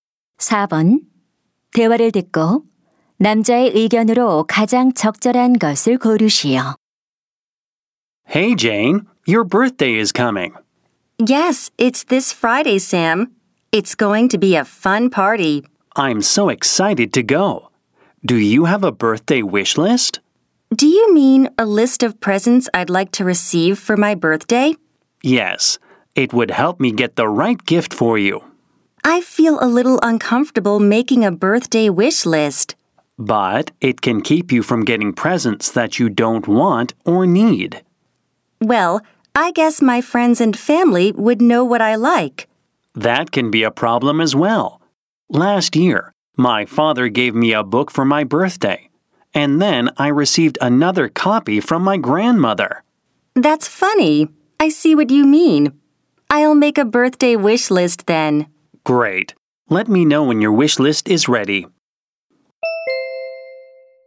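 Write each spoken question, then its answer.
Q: 대화를 듣고 남자의 의견으로 가장 적절한 것을 고르시오.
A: 생일 선물 희망 목록을 만들면 원하지 않는 선물을 받는 것을 막을 수 있다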